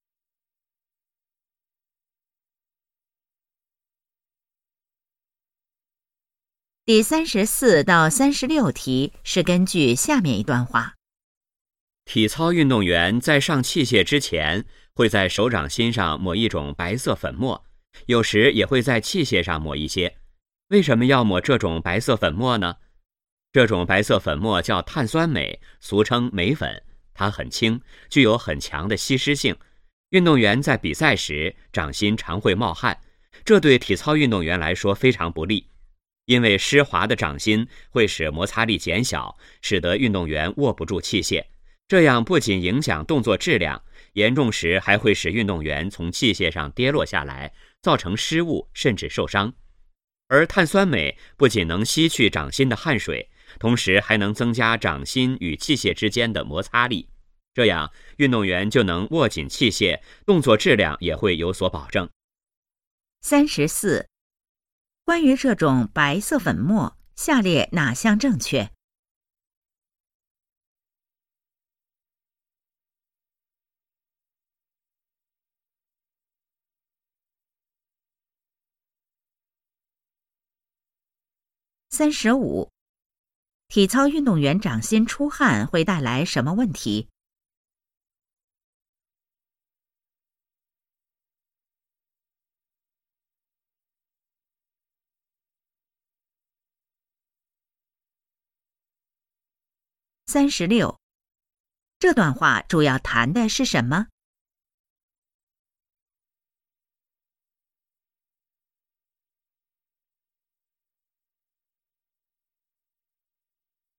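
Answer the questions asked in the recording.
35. 摩擦力减小,握不住器械
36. 体操运动员为什么在手上抹镁粉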